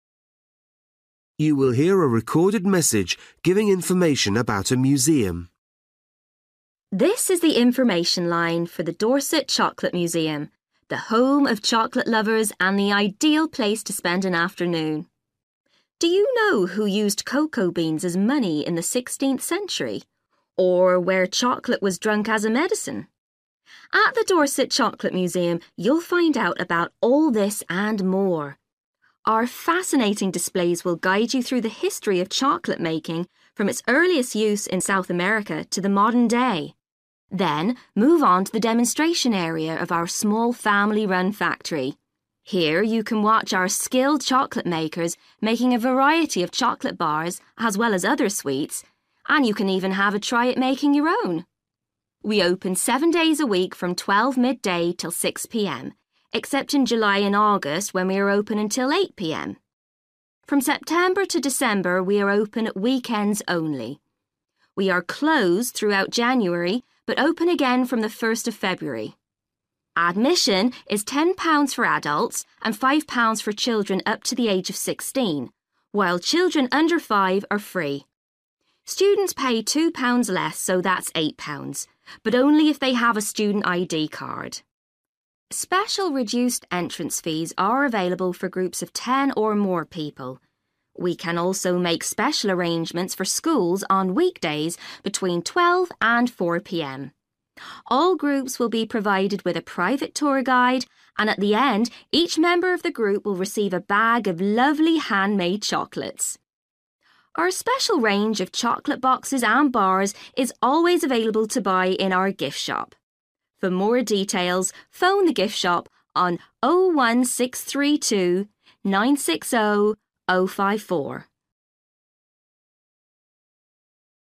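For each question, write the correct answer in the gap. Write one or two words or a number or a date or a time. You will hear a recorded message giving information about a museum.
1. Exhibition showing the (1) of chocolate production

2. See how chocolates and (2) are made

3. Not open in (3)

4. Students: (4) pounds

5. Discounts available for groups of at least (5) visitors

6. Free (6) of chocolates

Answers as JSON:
{"1": "history", "2": "sweets", "3": "January", "4": "eight", "5": "10", "6": "bag"}

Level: Luyện nghe trình độ B1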